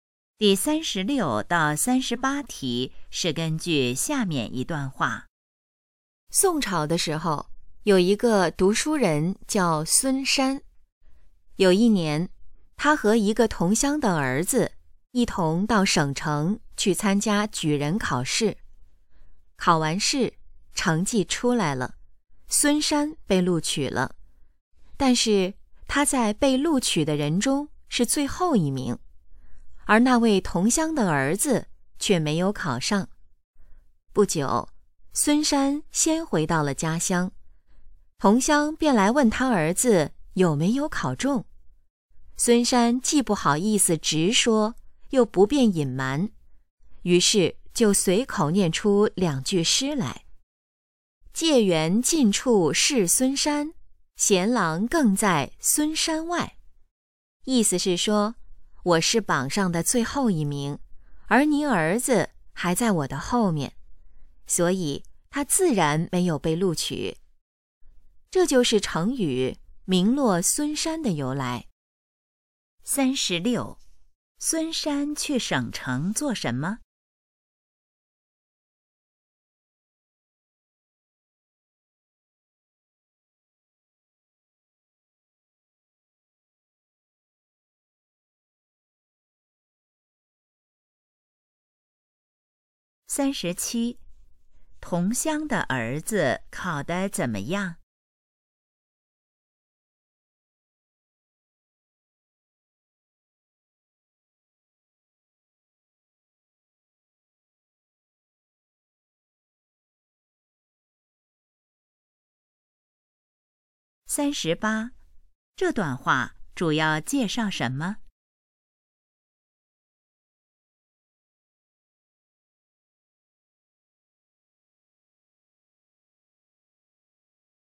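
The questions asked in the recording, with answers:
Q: 孙山去省城做什么?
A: 参加举人考试

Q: 同乡的儿子考得怎么样?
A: 没有考上

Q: 这段话主要介绍什么?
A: 成语名落孙山的由来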